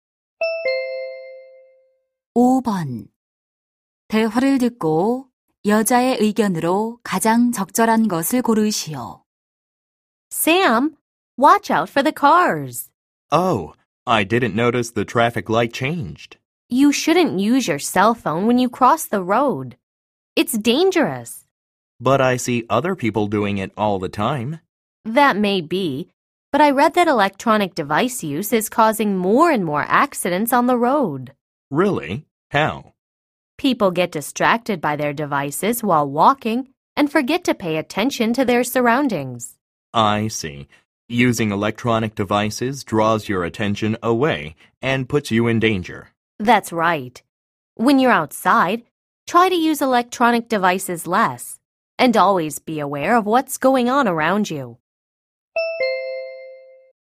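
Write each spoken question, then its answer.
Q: 대화를 듣고 여자의 의견으로 가장 적절한 것을 고르시오.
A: 길을 걸을 때 전자기기 사용을 줄이고 주변에 주의해야 한다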